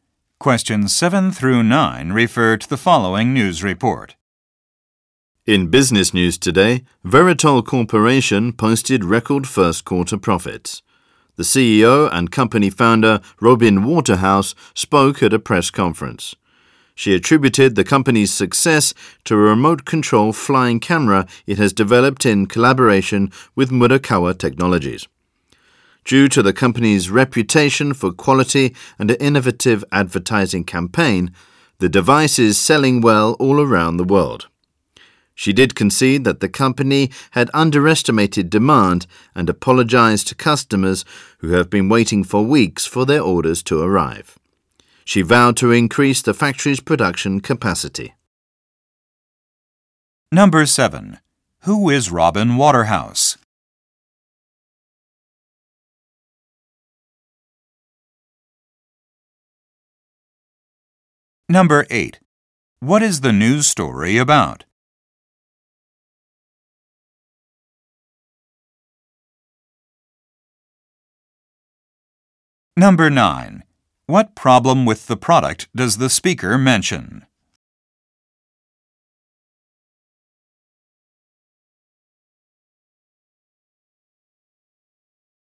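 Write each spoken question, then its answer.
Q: Who is Robin Waterhouse?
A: The CEO and founder of Veritol Corporation

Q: What is the news story about?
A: Veritol's record first quarter profits

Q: What problem with the product does the speaker mention?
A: Demand was underestimated, so customers have waited weeks for orders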